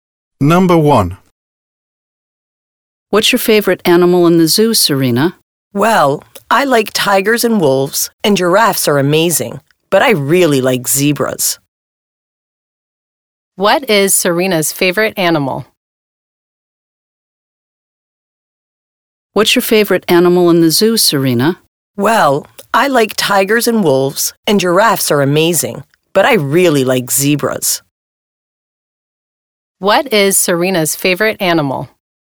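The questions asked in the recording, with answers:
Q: What is Serena's favorite animal?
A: zebras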